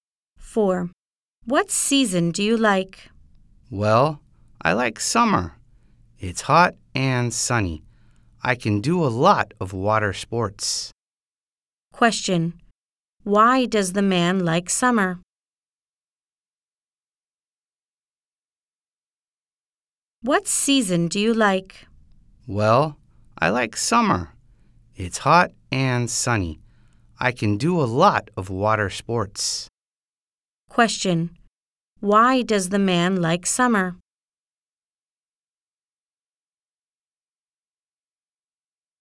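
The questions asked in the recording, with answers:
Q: Why does the man like summer?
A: He can do a lot of water sports.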